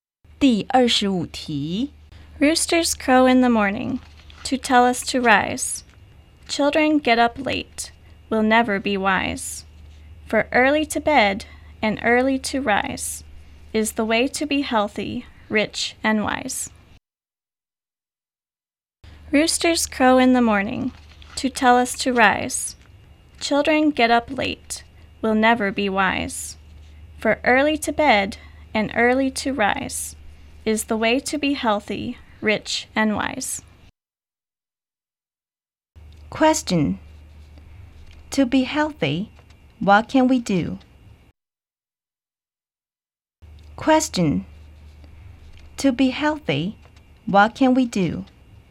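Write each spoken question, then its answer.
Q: Question. To be healthy, what can we do?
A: Go to bed early and get up early.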